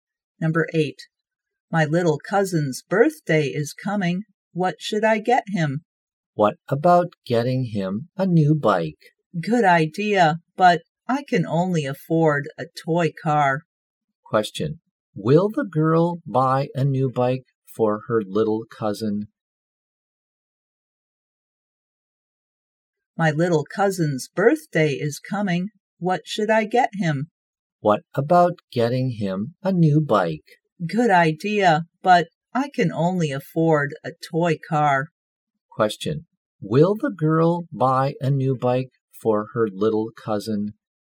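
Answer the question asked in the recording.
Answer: No, she will buy a toy car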